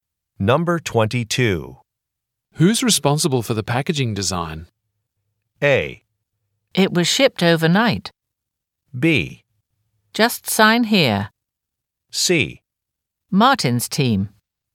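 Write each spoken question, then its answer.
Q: Who's responsible for the packaging design?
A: C: Martin's team.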